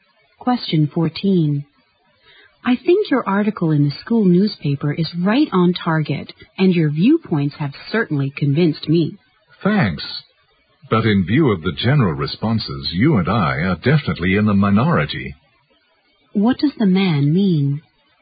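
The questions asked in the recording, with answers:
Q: What does the man mean?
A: Most people don't agree with his article.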